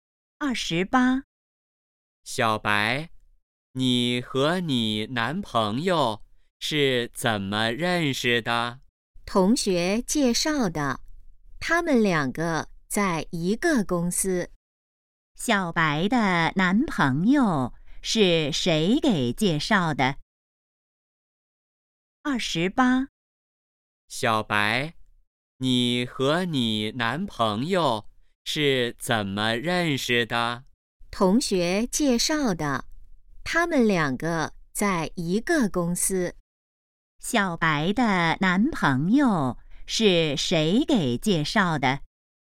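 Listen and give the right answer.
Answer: 同学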